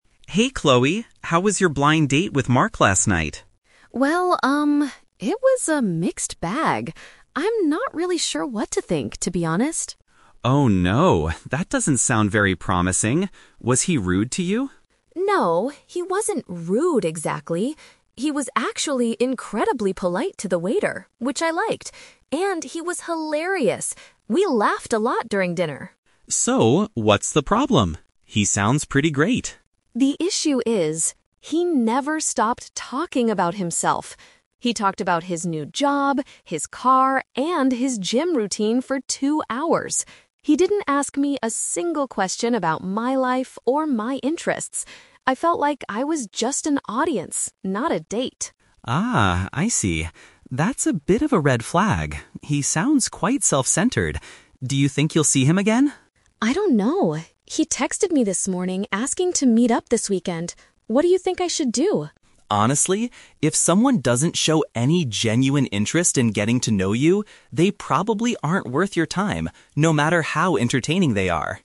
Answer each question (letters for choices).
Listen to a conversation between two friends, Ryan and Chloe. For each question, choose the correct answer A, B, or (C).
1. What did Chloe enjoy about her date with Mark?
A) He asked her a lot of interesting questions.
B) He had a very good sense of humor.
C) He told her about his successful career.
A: B

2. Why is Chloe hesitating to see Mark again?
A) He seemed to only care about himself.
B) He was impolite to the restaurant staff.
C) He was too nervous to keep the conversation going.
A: A

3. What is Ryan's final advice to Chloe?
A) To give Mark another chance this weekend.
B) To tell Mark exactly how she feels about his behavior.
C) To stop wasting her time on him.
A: C

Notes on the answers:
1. Chloe says that Mark was "hilarious" and they "laughed a lot." Having a "good sense of humor" is a paraphrase of being "hilarious."
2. Chloe complains that he "never stopped talking about himself" and Ryan concludes that Mark is "self-centered." Option A perfectly paraphrases this personality trait.
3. Ryan says that a person like Mark "probably aren't worth your time." This means Chloe should not continue dating him.

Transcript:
Ryan: Hey Chloe! How was your blind date with Mark last night?
it was a mixed bag. I'm not really sure what to think, to be honest.
Ryan: Oh no, that doesn't sound very promising. Was he rude to you?
Chloe: No, he wasn't rude exactly. He was actually incredibly polite to the waiter, which I liked. And he was hilarious! We laughed a lot during dinner.
Ryan: So, what's the problem? He sounds pretty great.
Chloe: The issue is... he never stopped talking about himself. He talked about his new job, his car, and his gym routine for two hours. He didn't ask me a single question about my life or my interests. I felt like I was just an audience, not a date.
Ryan: Ah, I see. That's a bit of a red flag. He sounds quite self-centered. Do you think you'll see him again?
Chloe: I don't know. He texted me this morning asking to meet up this weekend. What do you think I should do?
Ryan: Honestly? If someone doesn't show any genuine interest in getting to know you, they probably aren't worth your time, no matter how entertaining they are.